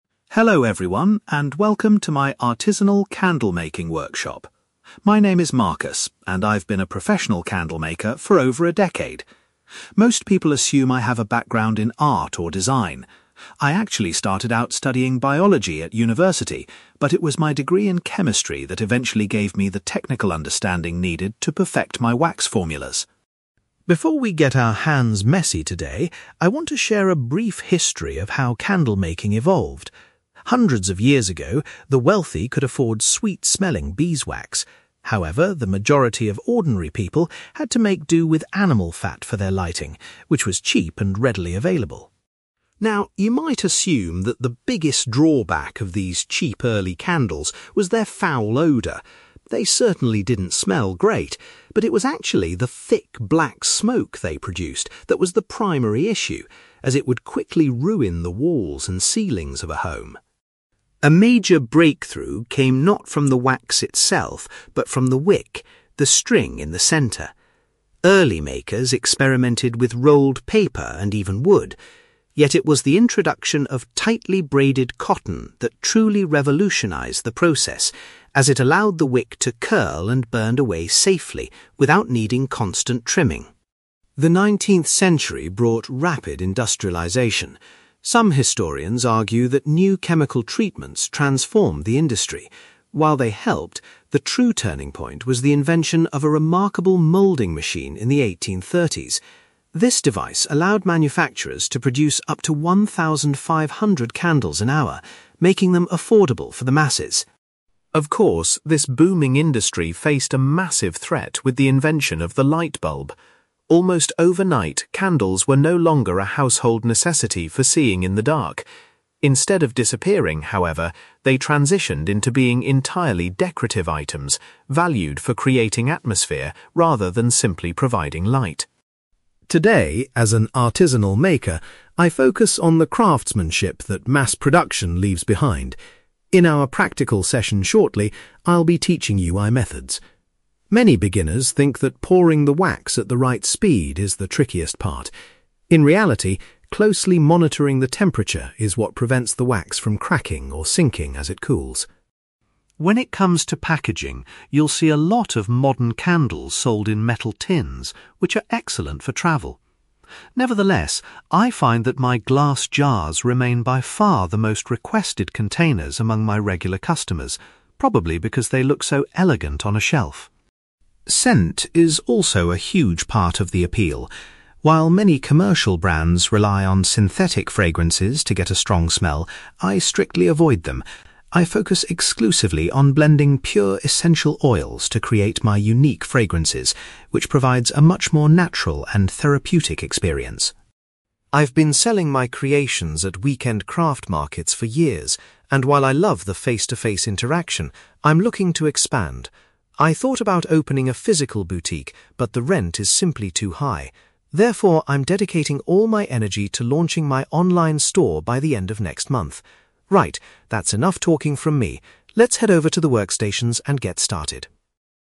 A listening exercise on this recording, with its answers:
For questions 9-18, complete the sentences with a word or short phrase.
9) Marcus says that his studies in (9)........................... were what helped him understand wax formulas.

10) Marcus explains that centuries ago, people with less money relied on (10)........................... to make their candles.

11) According to Marcus, the main problem with early, cheap candles was the (11)........................... that damaged people's homes.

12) Marcus points out that making wicks from (12)........................... improved how safely a candle burned.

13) Mass production became possible in the 1830s due to the creation of a new (13)........................... .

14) After the invention of electricity, candles were mainly bought as (14)........................... .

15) Marcus warns that paying close attention to the (15)........................... is the most critical skill for beginners to learn.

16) Marcus mentions that the candles he sells in (16)........................... are the most popular with his buyers.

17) Marcus prefers to use (17)........................... to give his artisanal candles their scent.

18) In the near future, Marcus plans to sell his products through an (18)........................... .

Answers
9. chemistry
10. animal fat
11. smoke
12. cotton
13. moulding machine
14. decorative items
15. temperature
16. glass jars
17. essential oils
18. online store

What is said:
Marcus: Hello everyone, and welcome to my artisanal candlemaking workshop. My name is Marcus, and I've been a professional candlemaker for over a decade. Most people assume I have a background in art or design. I actually started out studying biology at university, but it was my degree in chemistry that eventually gave me the technical understanding needed to perfect my wax formulas.
Before we get our hands messy today, I want to share a brief history of how candlemaking evolved. Hundreds of years ago, the wealthy could afford sweet-smelling beeswax. However, the majority of ordinary people had to make do with animal fat for their lighting, which was cheap and readily available.
Now, you might assume that the biggest drawback of these cheap early candles was their foul odour. They certainly didn't smell great, but it was actually the thick, black smoke they produced that was the primary issue, as it would quickly ruin the walls and ceilings of a home.
A major breakthrough came not from the wax itself, but from the wick – the string in the centre. Early makers experimented with rolled paper and even wood. Yet, it was the introduction of tightly braided cotton that truly revolutionised the process, as it allowed the wick to curl and burn away safely without needing constant trimming.
The 19th century brought rapid industrialisation. Some historians argue that new chemical treatments transformed the industry. While they helped, the true turning point was the invention of a remarkable moulding machine in the 1830s. This device allowed manufacturers to produce up to 1,500 candles an hour, making them affordable for the masses.
Of course, this booming industry faced a massive threat with the invention of the lightbulb. Almost overnight, candles were no longer a household necessity for seeing in the dark. Instead of disappearing, however, they transitioned into being entirely decorative items, valued for creating atmosphere rather than simply providing light.
Today, as an artisanal maker, I focus on the craftsmanship that mass production leaves behind. In our practical session shortly, I'll be teaching you my methods. Many beginners think that pouring the wax at the right speed is the trickiest part. In reality, closely monitoring the temperature is what prevents the wax from cracking or sinking as it cools.
When it comes to packaging, you'll see a lot of modern candles sold in metal tins, which are excellent for travel. Nevertheless, I find that my glass jars remain by far the most requested containers among my regular customers, probably because they look so elegant on a shelf.
Scent is also a huge part of the appeal. While many commercial brands rely on synthetic fragrances to get a strong smell, I strictly avoid them. I focus exclusively on blending pure essential oils to create my unique fragrances, which provides a much more natural and therapeutic experience.
I've been selling my creations at weekend craft markets for years, and while I love the face-to-face interaction, I'm looking to expand. I thought about opening a physical boutique, but the rent is simply too high. Therefore, I'm dedicating all my energy to launching my online store by the end of next month. Right, that's enough talking from me. Let's head over to the workstations and get started!

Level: B2